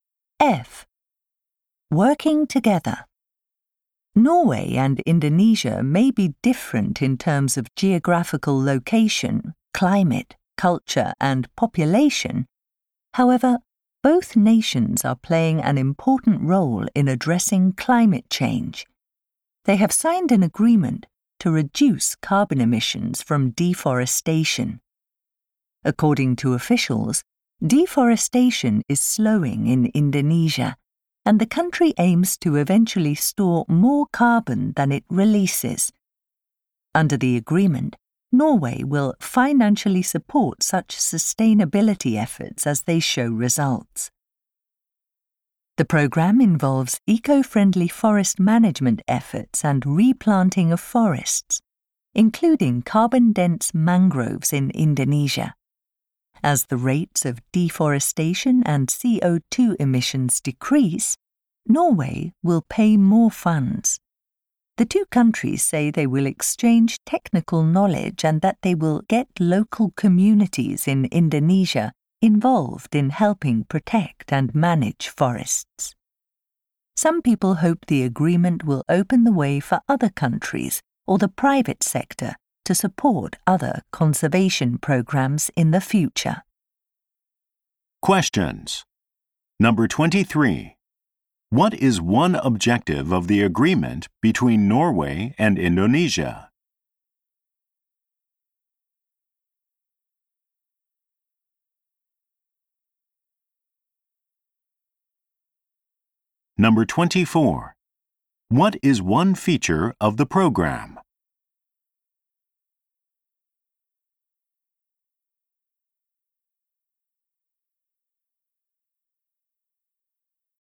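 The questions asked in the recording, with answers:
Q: What is one objective of the agreement between Norway and Indonesia?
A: To reduce carbon emissions from deforestation.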